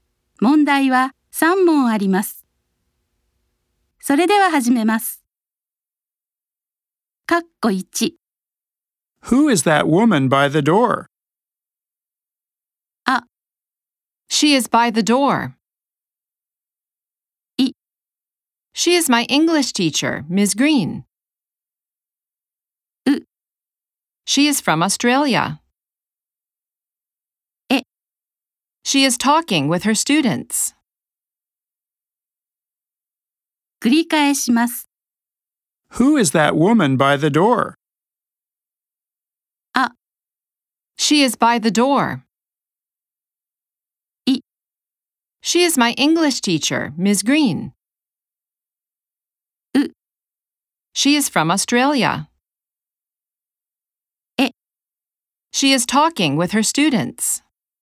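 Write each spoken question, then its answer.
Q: Who is that woman by the door?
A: B: She is my English teacher, Ms. Green.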